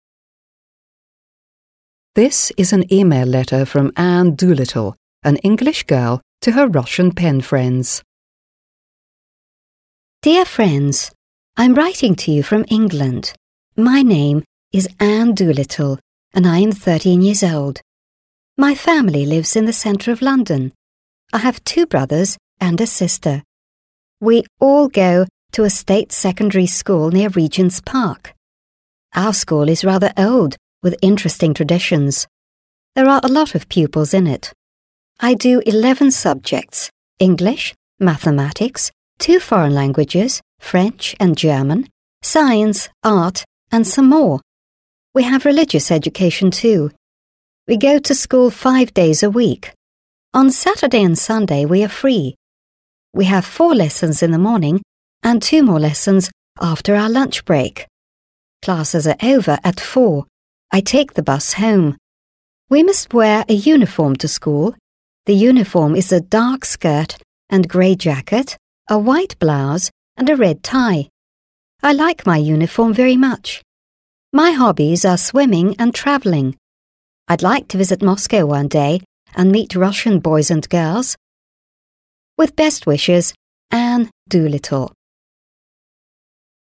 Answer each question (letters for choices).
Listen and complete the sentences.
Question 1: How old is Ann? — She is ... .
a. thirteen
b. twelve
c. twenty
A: a

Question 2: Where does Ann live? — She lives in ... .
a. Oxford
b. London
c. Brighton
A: b

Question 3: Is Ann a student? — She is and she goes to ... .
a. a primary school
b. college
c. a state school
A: c

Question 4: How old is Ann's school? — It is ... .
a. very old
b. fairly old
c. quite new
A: b

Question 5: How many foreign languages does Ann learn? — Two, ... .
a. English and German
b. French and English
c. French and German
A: c

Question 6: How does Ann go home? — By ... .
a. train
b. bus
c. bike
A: b

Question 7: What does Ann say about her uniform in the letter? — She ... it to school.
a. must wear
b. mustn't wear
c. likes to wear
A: a

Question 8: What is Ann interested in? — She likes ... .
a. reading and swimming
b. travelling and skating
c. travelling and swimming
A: c

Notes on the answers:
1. Вопрос касается возраста Энн. Ответ является простым числовым, с использованием числа «thirteen» (тринадцать), что соответствует стандартной структуре ответа, где возраст указывается числом.
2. Здесь важен вопрос о месте жительства Энн. Вопрос требует ответа с названием города, в котором она живёт. Мы видим, что это «London», и это единственный правильный ответ.
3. Вопрос касается того, является ли Энн студентом. Правильный ответ указывает на то, что она учится в государственной школе, что важно в контексте образовательной системы.
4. В этом вопросе идет речь о возрасте школы, в которой учится Энн. Ответ «fairly old» означает, что школа достаточно старая, но не совсем древняя.
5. Вопрос касается того, сколько иностранных языков изучает Энн. Ответ, что она учит два языка, французский и немецкий, является точным и правильным.
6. Вопрос о том, как Энн добирается домой. Ответ «by bus» указывает на транспортное средство, которым она пользуется.
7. Вопрос об униформе Энн в письме. Ответ указывает, что она должна носить форму в школу, это строгий и обязательный элемент школьной жизни.
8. Вопрос о том, чем интересуется Энн. Ответ включает два хобби, которые ей нравятся: путешествия и плавание. Это расширяет понимание ее увлечений.

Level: 7 класс